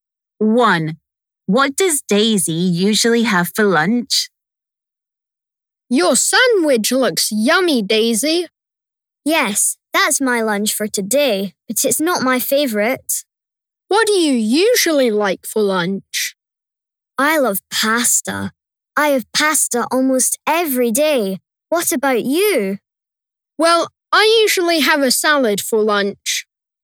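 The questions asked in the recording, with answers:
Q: What does Daisy usually have for lunch?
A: pasta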